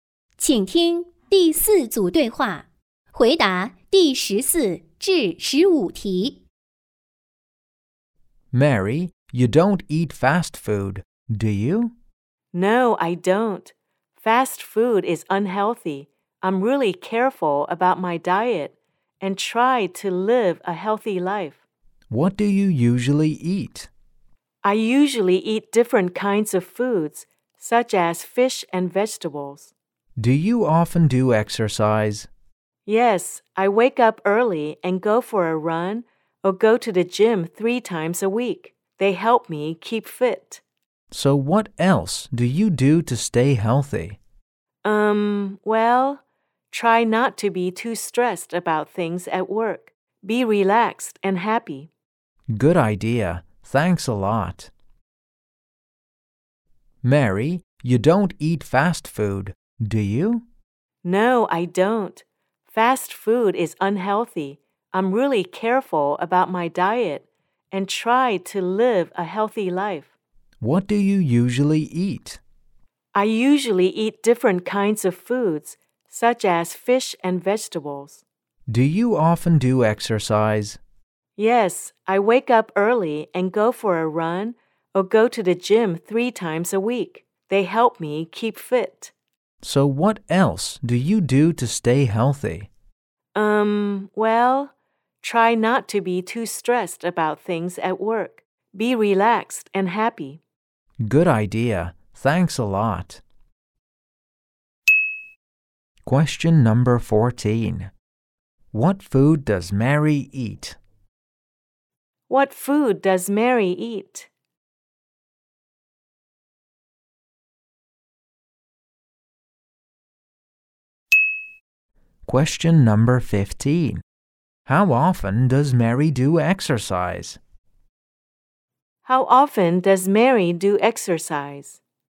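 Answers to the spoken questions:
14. Fish and vegetables
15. Three times a week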